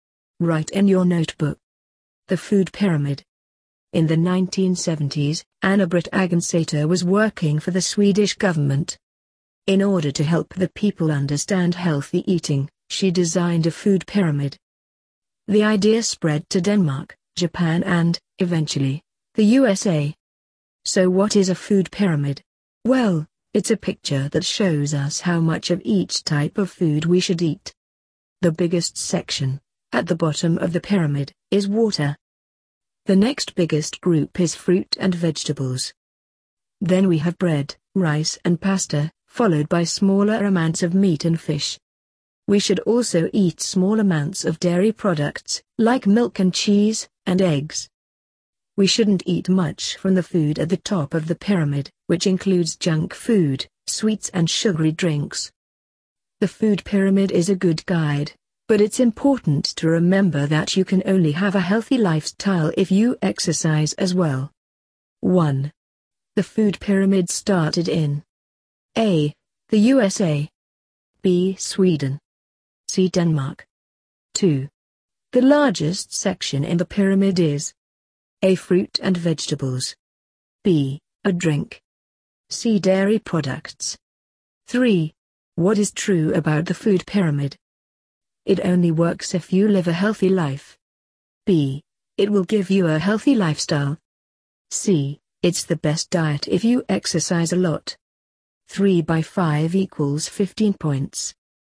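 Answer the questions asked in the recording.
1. B: Sweden
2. B: A drink
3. A: It only works if you live a healthy life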